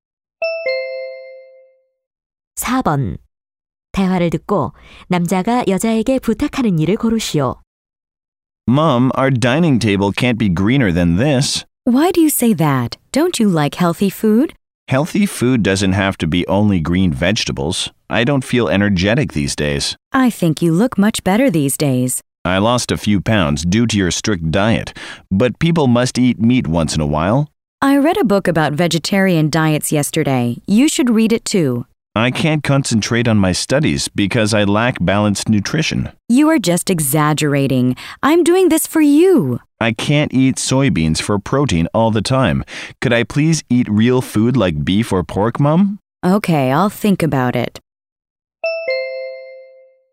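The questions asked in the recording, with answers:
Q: 대화를 듣고 남자가 여자에게 부탁하는 일을 고르시오.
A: 소고기나 돼지고기 같은 고기 요리를 해 달라고 부탁한다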